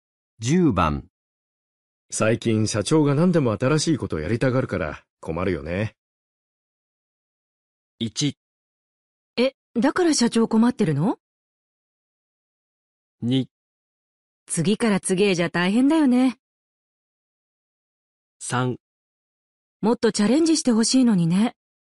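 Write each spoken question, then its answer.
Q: 最近社長が何でも新しいことをやりたがるから困るよね。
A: 2: 次から次へじゃ大変だよね。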